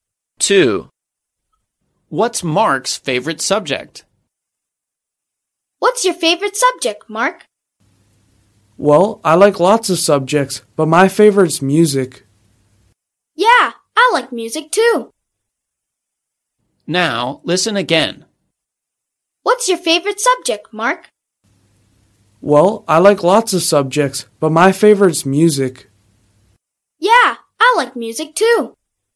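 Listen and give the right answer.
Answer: music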